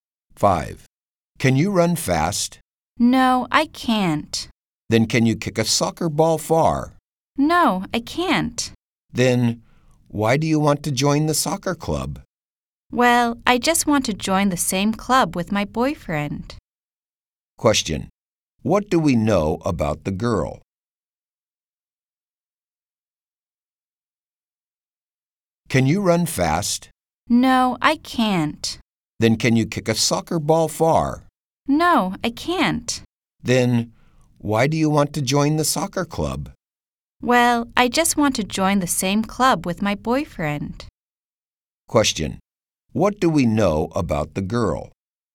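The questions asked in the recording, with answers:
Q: What do we know about the girl?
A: She wants to join the soccer club because her boyfriend is in it.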